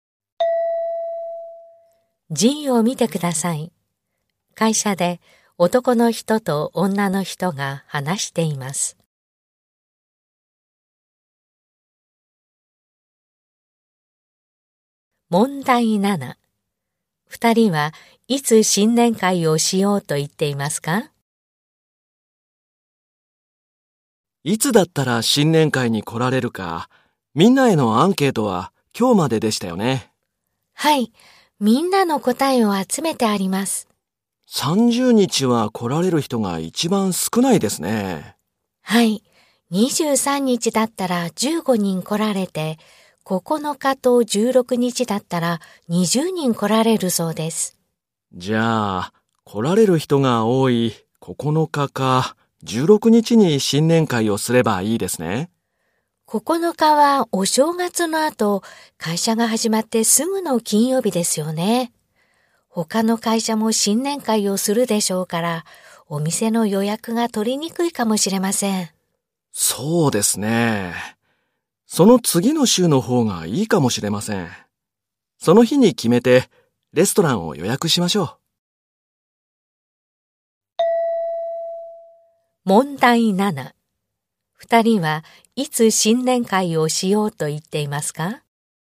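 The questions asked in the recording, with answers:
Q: 2人はいつ新年会をしようと言っていますか?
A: 16日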